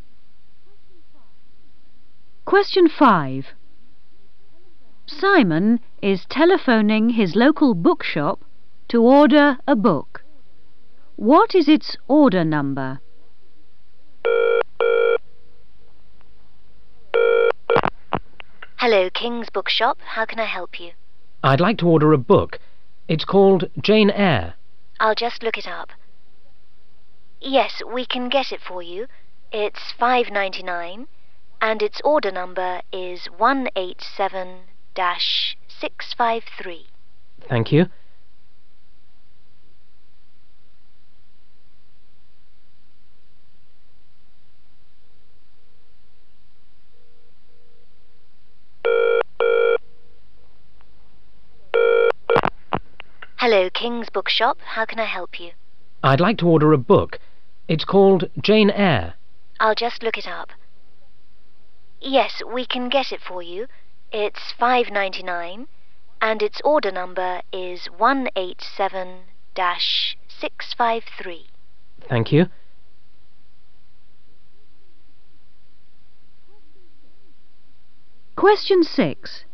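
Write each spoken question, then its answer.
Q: What is its order number?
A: 187-653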